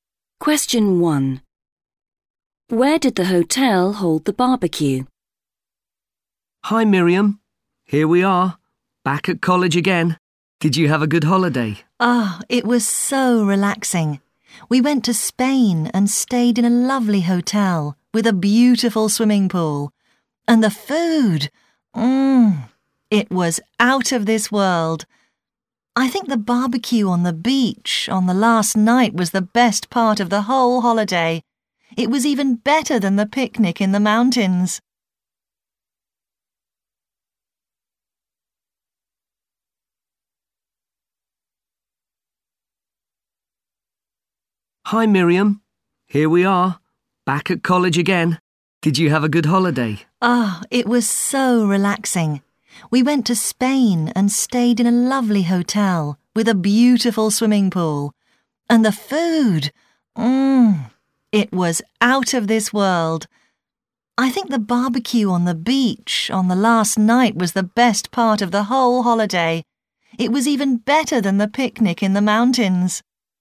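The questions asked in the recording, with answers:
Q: Where did the hotel hold the barbecue?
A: On the beach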